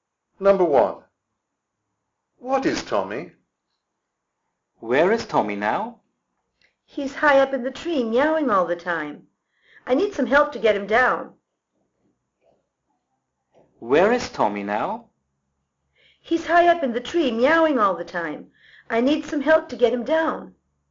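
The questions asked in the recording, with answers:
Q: What is Tommy?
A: a cat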